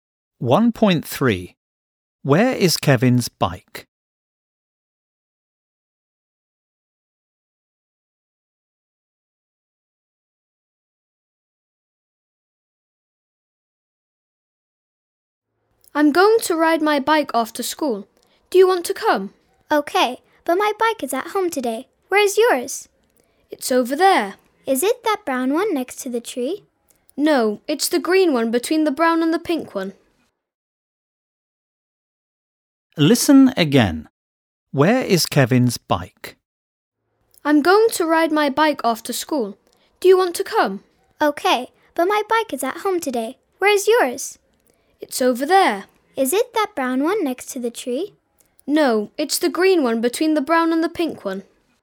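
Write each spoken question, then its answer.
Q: Where is Kevin's bike?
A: Between the brown bike and the pink bike (the green one)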